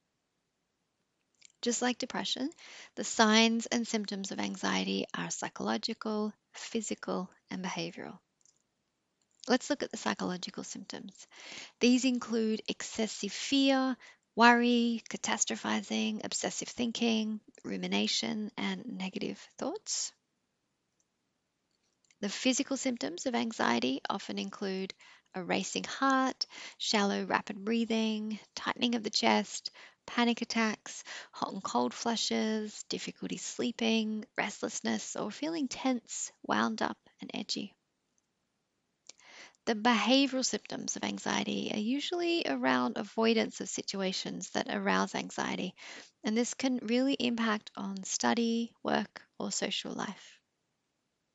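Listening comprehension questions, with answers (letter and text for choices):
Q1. What are the signs and symptoms of anxiety?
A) Psychological.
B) Physical.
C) Behavioural.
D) All of the above.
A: D) All of the above.

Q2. What are the behavioural symptoms of anxiety?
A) Avoidance of situations that arouse anxiety.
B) Depressed mood.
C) Purging.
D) All of the above.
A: A) Avoidance of situations that arouse anxiety.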